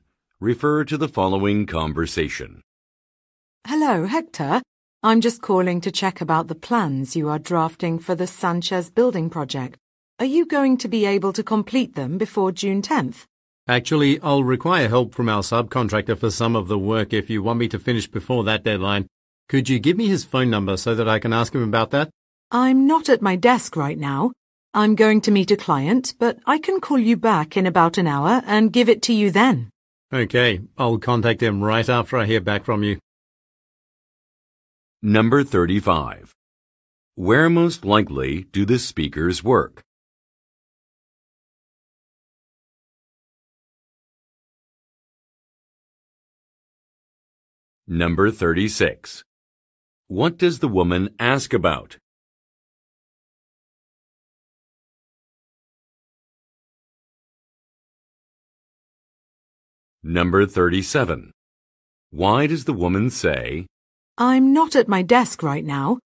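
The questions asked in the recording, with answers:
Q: What does the woman ask about?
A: Whether the plans for the Sanchez building project will be finished before June 10th

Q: Why does the woman say,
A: She can't give him the subcontractor's phone number right now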